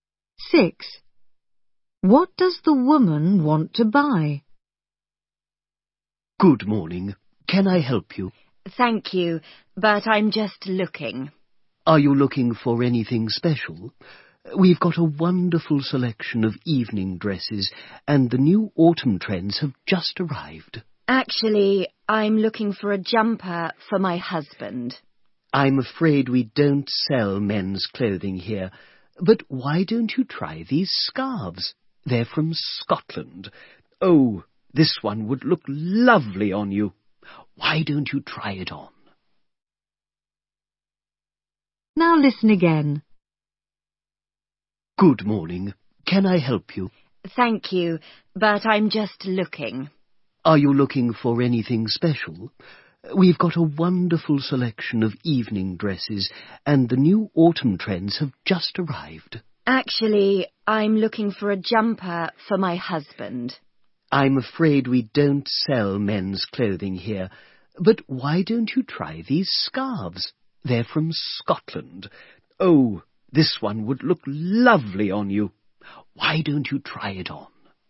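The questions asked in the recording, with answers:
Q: What does the woman want to buy?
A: A jumper for her husband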